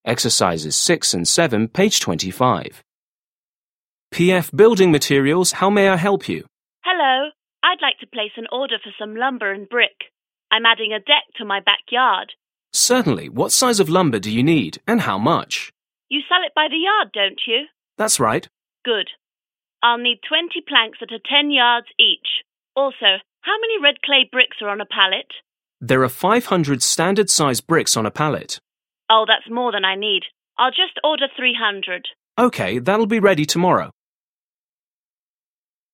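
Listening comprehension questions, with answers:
7. Listen again and complete the conversation.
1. Customer: Hello. I'd like to 1________________________ for some lumber and brick.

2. Clerk: Certainly. What 2_________________ do you need, and how much?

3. Customer: You sell it by the 3_____________, don't you?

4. Clerk: 4___________.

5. Also, how many red clay bricks are on 5 ___________?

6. Clerk: There are 6 __________ standard size bricks on a pallet.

6. Listen to a conversation between a clerk and a customer. Mark the following statements as true (T) or false (F).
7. The woman is adding a porch to her front yard.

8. The company sells lumber by the yard.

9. The woman needs a pallet of bricks.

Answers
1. place an order
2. size of lumber
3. yard
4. That's right
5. a pallet
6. 500
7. F
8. T
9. F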